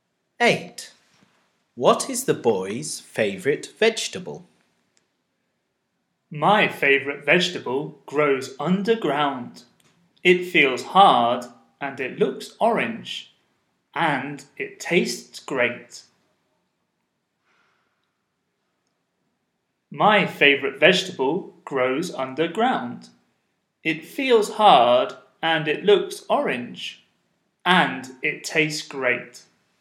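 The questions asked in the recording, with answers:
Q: What is the boy's favourite vegetable?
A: a carrot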